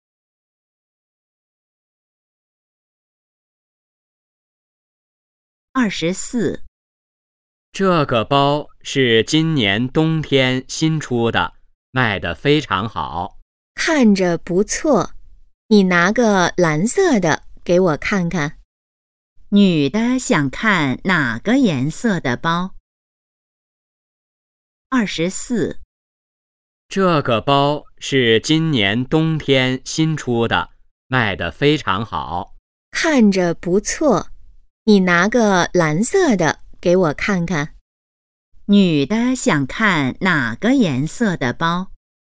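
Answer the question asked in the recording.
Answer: 蓝色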